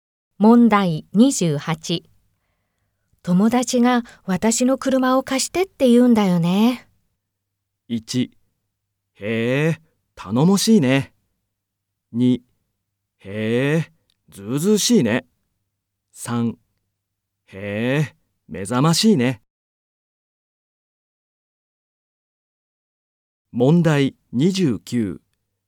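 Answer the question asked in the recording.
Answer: 2: へえ、ずうずうしいね。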